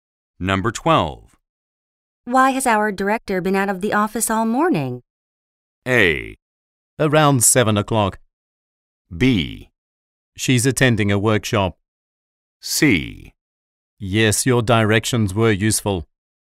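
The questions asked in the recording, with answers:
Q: Why has our director been out of the office all morning?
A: B: She's attending a workshop.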